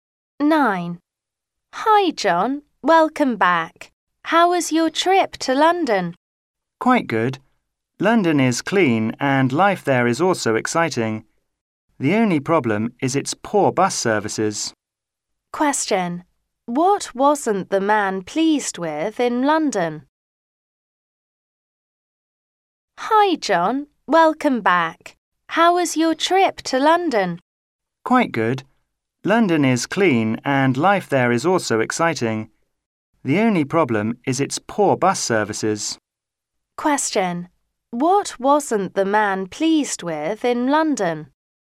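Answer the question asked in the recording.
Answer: Its poor bus services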